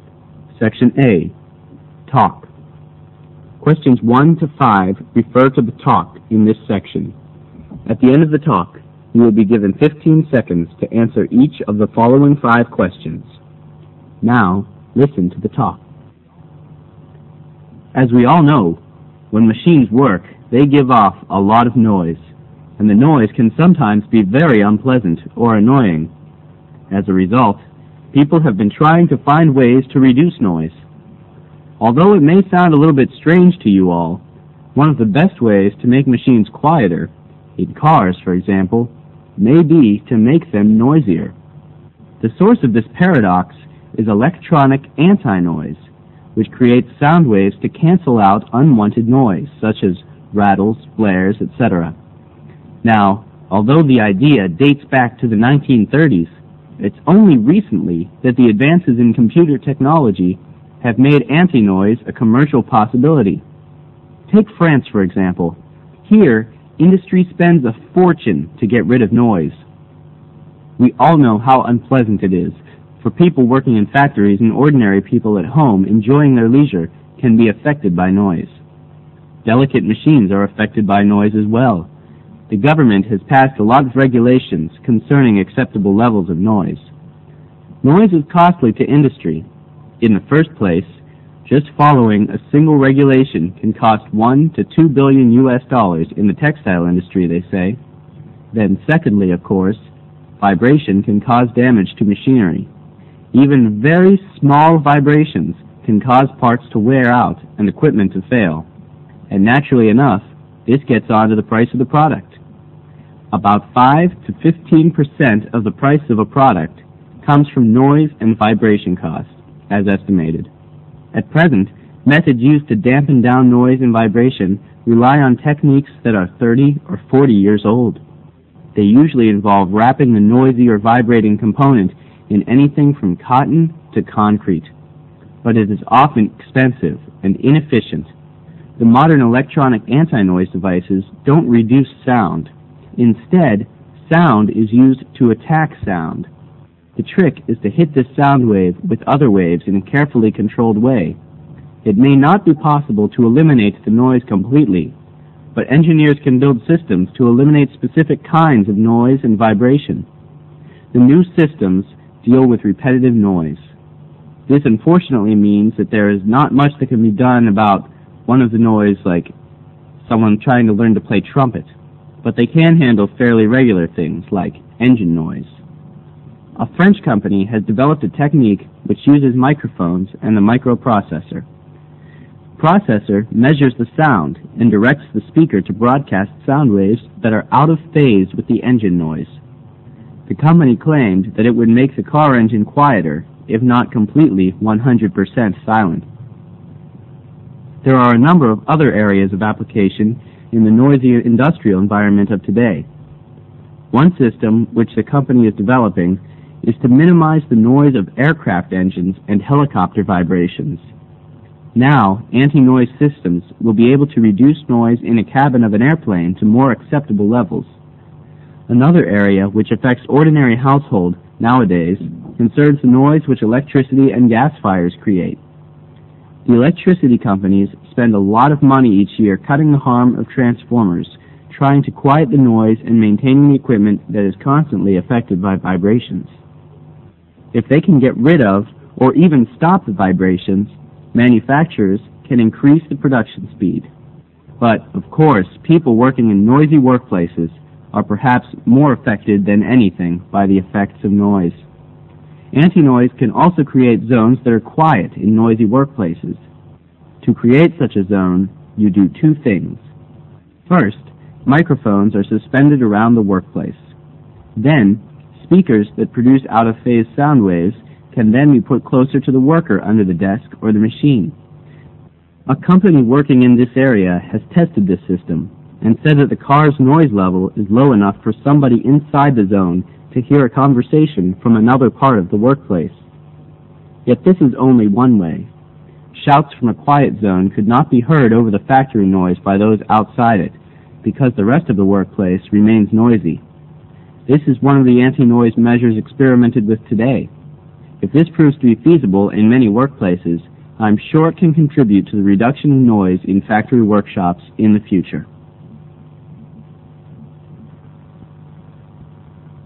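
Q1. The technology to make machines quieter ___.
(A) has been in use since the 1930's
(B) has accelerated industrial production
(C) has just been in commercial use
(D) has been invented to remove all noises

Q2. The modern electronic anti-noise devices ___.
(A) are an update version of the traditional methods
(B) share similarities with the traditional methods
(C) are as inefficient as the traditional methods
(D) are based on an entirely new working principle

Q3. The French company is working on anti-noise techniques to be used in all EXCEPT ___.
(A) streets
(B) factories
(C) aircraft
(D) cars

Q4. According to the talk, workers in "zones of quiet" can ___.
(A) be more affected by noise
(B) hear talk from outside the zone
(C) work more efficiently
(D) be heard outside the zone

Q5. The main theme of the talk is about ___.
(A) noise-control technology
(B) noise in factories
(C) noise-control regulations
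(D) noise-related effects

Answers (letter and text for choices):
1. (C) has just been in commercial use
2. (D) are based on an entirely new working principle
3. (A) streets
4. (B) hear talk from outside the zone
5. (A) noise-control technology

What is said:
SECTION A TALK
As we all know, when machines work they give off a lot of noise, and the noise can sometimes be very unpleasant, or annoying. As a result, people have been trying to find ways to reduce noise. Although it may sound a bit strange to you all, one of the best ways to make machines quieter, in cars for example, may be to make them noisier. The source of this paradox is electronic anti-noise which creates sound waves to cancel out unwanted noise, such as rattles, blare, etc.
Now although the idea dates back to the 1930s, it's only recently that advances in computer technology have made anti-noise a commercial possibility. 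Take Franc e for example. Here industry spends a fortune to get rid of noise. We all know how unpleasant it is. Both people working in factories and ordinary people at home enjoying their leisure can be affected by noise. Delicate machines are affected by noise as well. The government has passed a lot of regulations concerning acceptable levels of noise.
Noise is costly to industry. In the first place, just following a single regulation can cost 1 to 2 billion US dollars in the textile industry, they say.
Then secondly, of course, vibration can cause damage to machinery. Even very small vibrations can cause parts to wear out and equipment to fail. And naturally enough, this gets added on to the price of the products. About $ to 15% of the price of a product comes from noise and vibration costs, it's estimated.
At present, methods used to dampen down noise and vibrations rely on techniques that are 30 or 40 years old. 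These usually involve wrapping the noisy or vibrating component in anything from cotton to concrete. But this is often expensive and inefficient.
The modern electronic anti-noise devices don't reduce sound. Instead, sound is used to attack sound. The trick is to hit these sound waves with other waves in a carefully controlled way. It may not be possible to eliminate noise completely, but engineers can build systems to eliminate specific kinds of noise and vibration. The new systems can deal with repetitive noise. This unfortunately means that there is not much that can be done about one-off noise, like someone try ing to learn to play a trumpet. But they can handle fairly regular things like engine noise.
A French company has developed a technique which uses a microphone and a microprocessor. The processor measures the sound and directs a speaker to broadcast sound waves that are out of phase with the engine noise. 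The company claimed t hat it will make a car engine quieter, if not completely 100% silent. There are a number of other areas of application in the noisy, industrial environment of today. One system which the company is developing, aims to minimize the noise of aircraft engines and helicopter vibrations. Now anti-noise systems would be able to reduce noise in the cabin of an airplane to mere acceptable levels.
Another area which affects ordinary households nowadays concerns the noise which electricity and gas suppliers create. The electricity companies spend a lo t of money each year, cutting the harm of transformers, trying to quiet the noise and maintaining equipment that is constantly affected by vibration. If they can get rid of or even stop the vibrations, manufacturers can increase
But, of course, people working in noisy workplaces are perhaps mere affected than anything by the effects of noise. 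Anti-noise can also create "zones of quiet" in noisy workplaces. To create such a zone, you do two things.
First, microphones are suspended around the workplace. Then speakers that produce out-of-phase sound waves can then be put close to the worker under the desk o r the machine. A company working in this area has tested this system and says that it cuts noise levels enough for somebody inside the zone to hear a conversation from another part of the work place. Yet, this is only one-way; shouts from t he quiet zone could not be heard over the factory noise by those outside it, because the rest of the workplace remains noisy. This is one of the anti-noise measures experimented with today. If this proves to be feasible in many workplaces, I'm sure it can contribute to the reduction of noise in factory workshops in the future.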